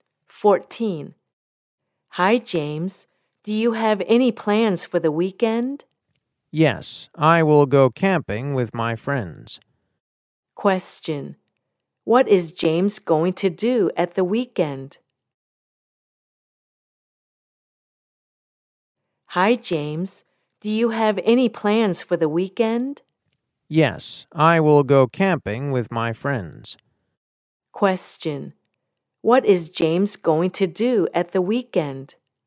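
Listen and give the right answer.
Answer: Go camping with his friends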